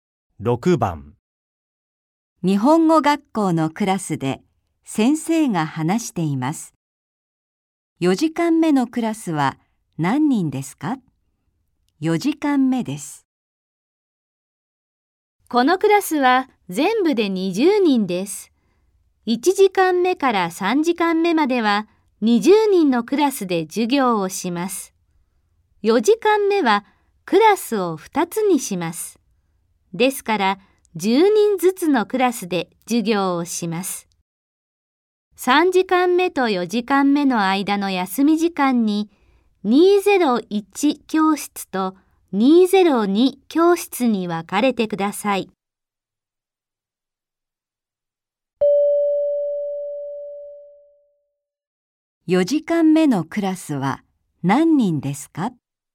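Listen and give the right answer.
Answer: 10人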